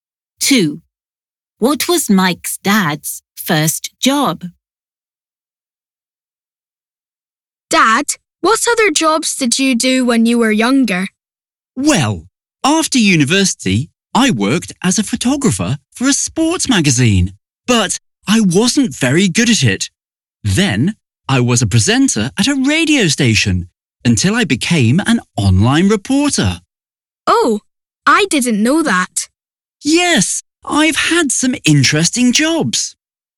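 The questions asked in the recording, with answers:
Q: What was Mike's dad's first job?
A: A photographer for a sports magazine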